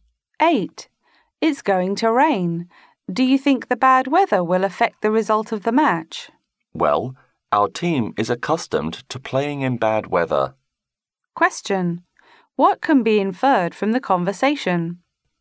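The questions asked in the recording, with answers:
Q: What can be inferred from the conversation?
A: The bad weather won't affect their team much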